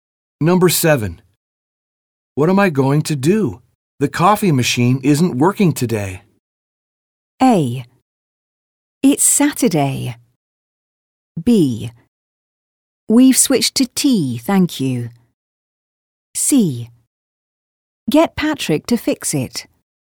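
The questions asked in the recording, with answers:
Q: What am I going to do? The coffee machine isn't working today.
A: C: Get Patrick to fix it.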